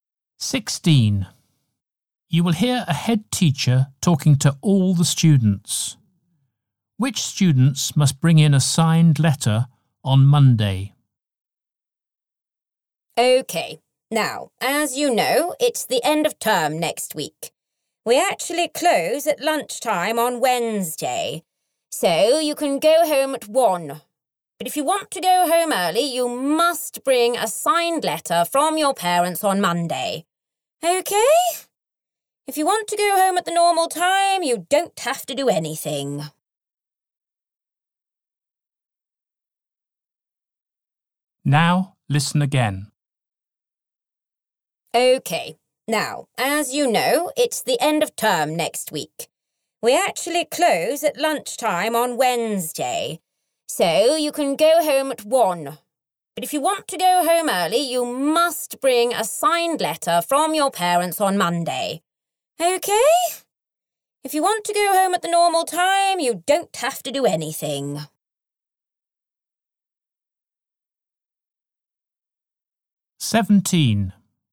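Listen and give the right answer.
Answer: Students who want to go home early on Wednesday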